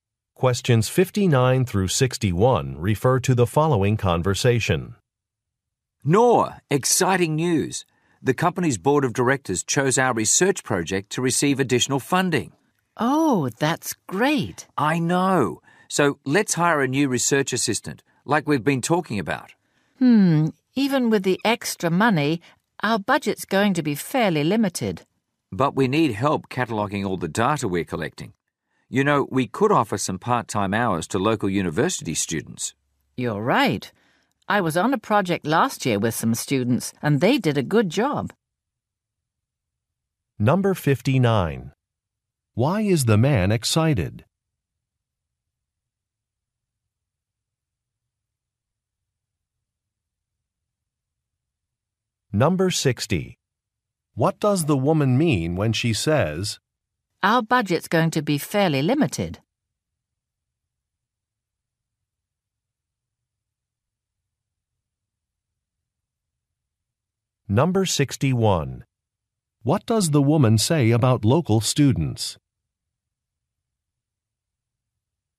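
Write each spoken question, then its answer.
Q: Why is the man excited?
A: Their research project got additional funding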